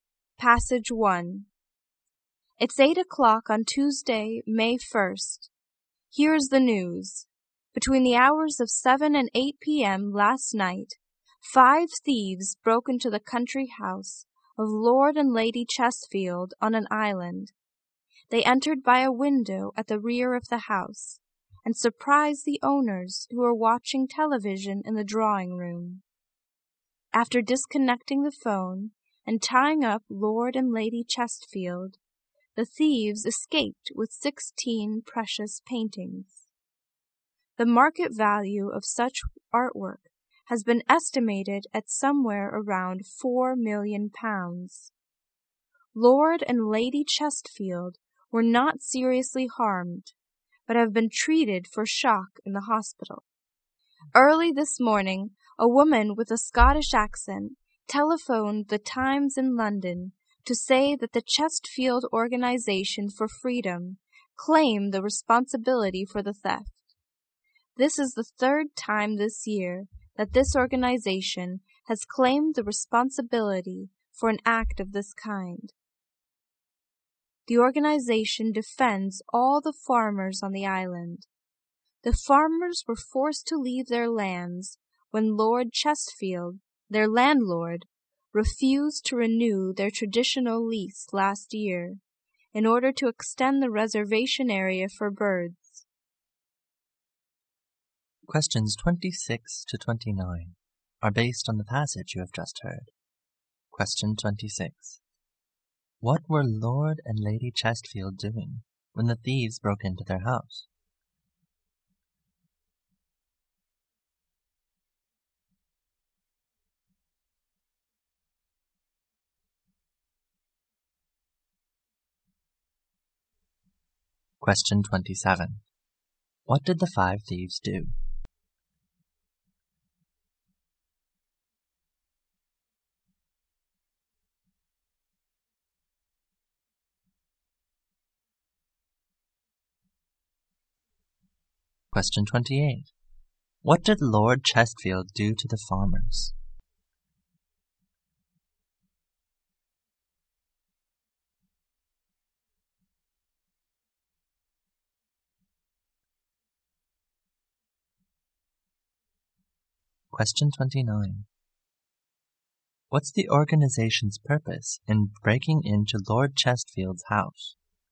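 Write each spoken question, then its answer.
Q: What were Lord and Lady Chesfield doing when the thieves broke into their house?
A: Watching television in the drawing room.

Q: What did the five thieves do?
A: They tied up the owners and stole 16 precious paintings.

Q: What did Lord Chesfield do to the farmers?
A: He refused to renew their leases, forcing them off their land.

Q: What's the organization's purpose in breaking into Lord Chesfield's house?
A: To defend the farmers on the island.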